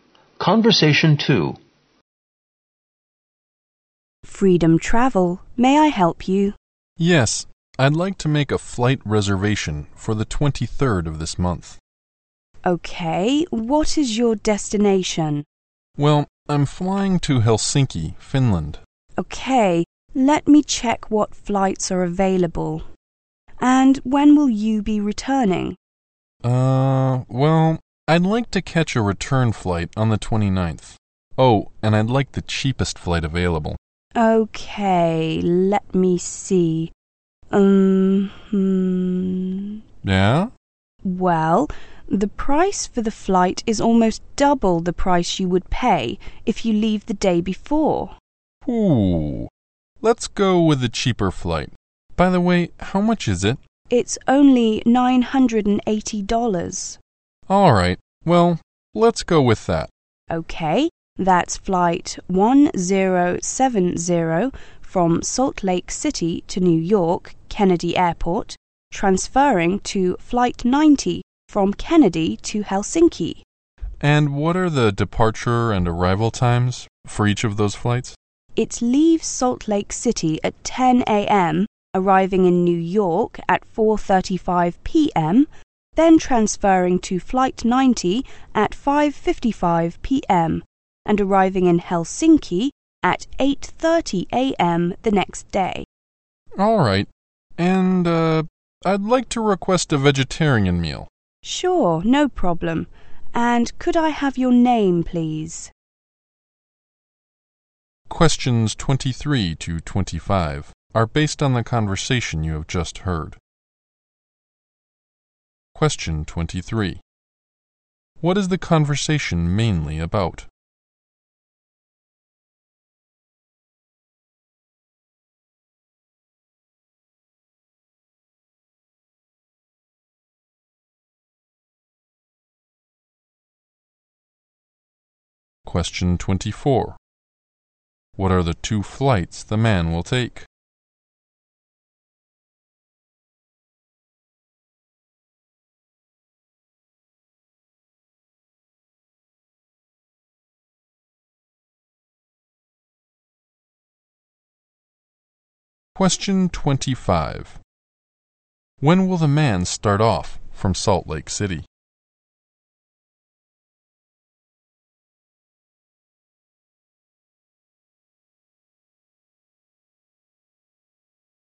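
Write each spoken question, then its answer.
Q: What is the conversation mainly about?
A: Making a flight reservation.

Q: What are the two flights the man will take?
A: Flight 1070 from Salt Lake City to New York and flight 90 from New York to Helsinki.

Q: When will the man start off from Salt Lake City?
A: At 10 a.m. (on the 22nd).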